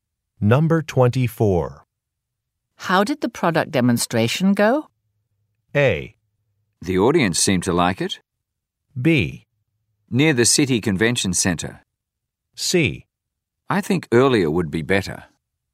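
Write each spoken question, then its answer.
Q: How did the product demonstration go?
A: A: The audience seemed to like it.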